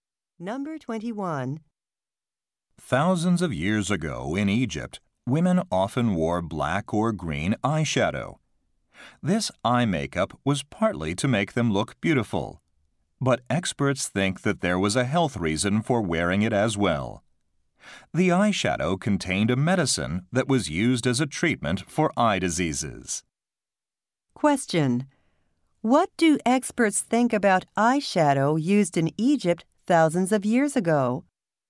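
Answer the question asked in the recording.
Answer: It contained medicine for eye diseases.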